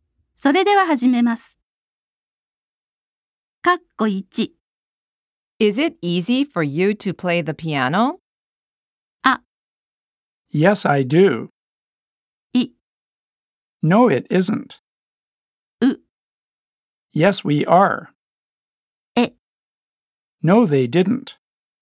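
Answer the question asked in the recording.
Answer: I: No, it isn't.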